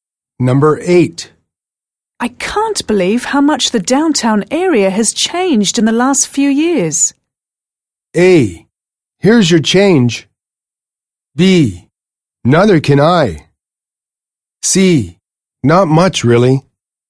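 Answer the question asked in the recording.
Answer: B: Neither can I.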